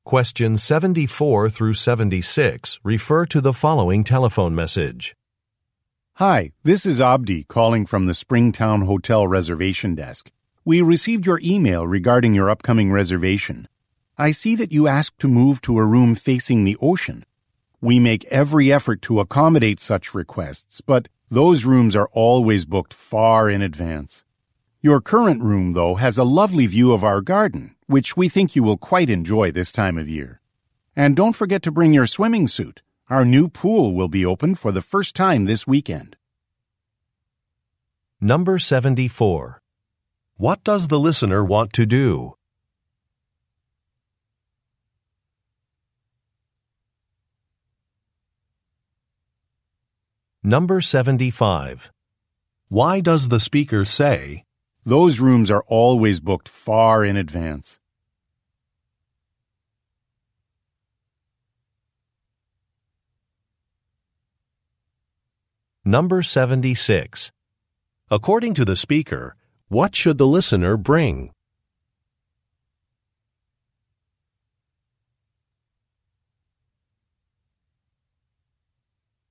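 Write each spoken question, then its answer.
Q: What does the listener want to do?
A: Move to a room facing the ocean

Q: According to the speaker, what should the listener bring?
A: A swimming suit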